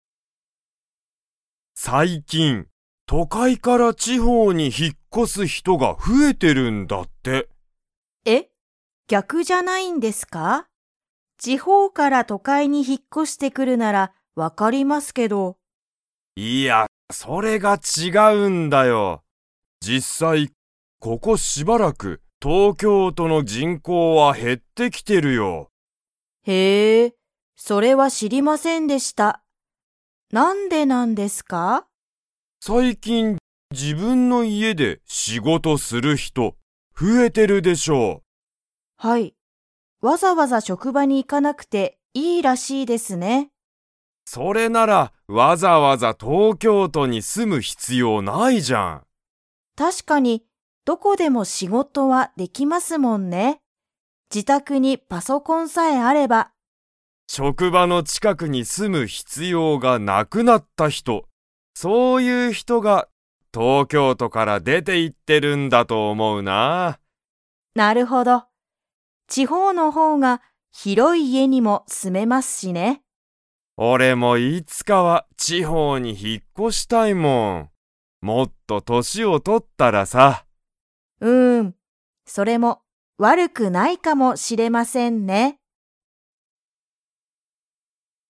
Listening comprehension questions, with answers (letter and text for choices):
Comprehension Quiz (Skip if you don't understand the conversation yet)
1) 東京都とうきょうとの何なにが減へってきていますか?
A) 地方ちほう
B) 人口じんこう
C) 仕事しごと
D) 広ひろい家いえ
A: B) 人口じんこう

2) 東野とうのさんは、年としをとったら地方ちほうに 。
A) 引ひっ越こしたい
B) 引ひっ越こしたくない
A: A) 引ひっ越こしたい